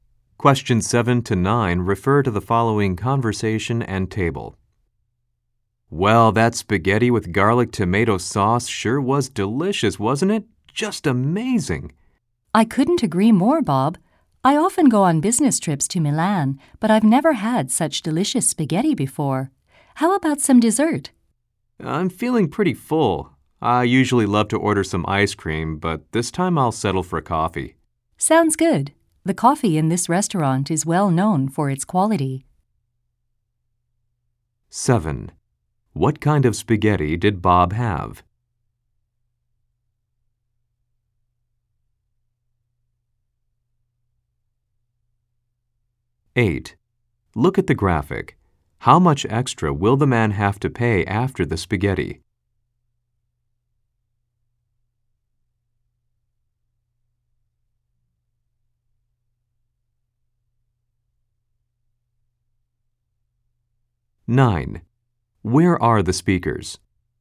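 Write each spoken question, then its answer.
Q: What kind of spaghetti did Bob have?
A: Spaghetti with garlic tomato sauce

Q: Where are the speakers?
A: In a restaurant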